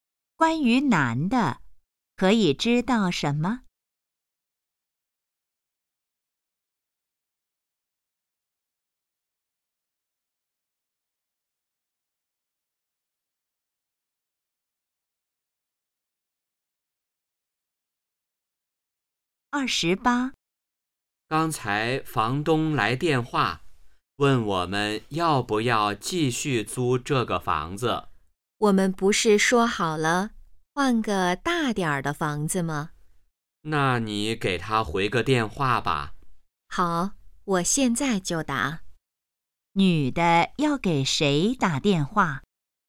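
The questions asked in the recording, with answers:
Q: 女的要给谁打电话?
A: 房东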